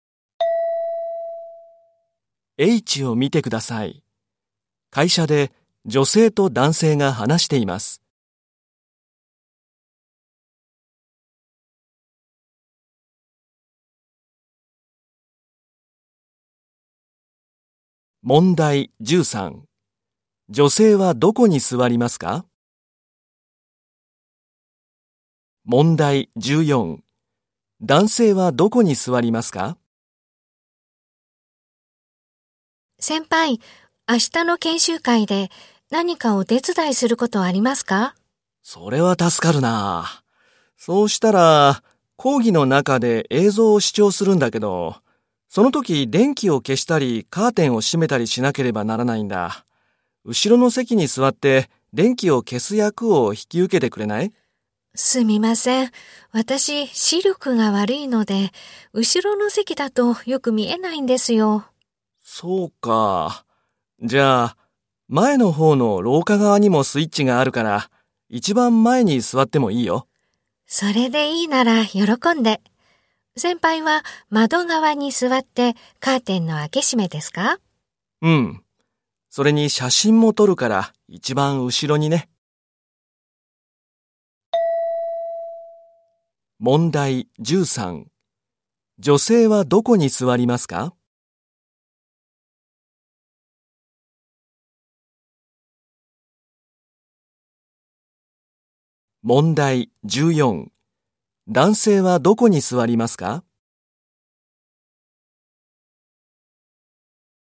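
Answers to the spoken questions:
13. 一番前の廊下側
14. 一番後ろの窓側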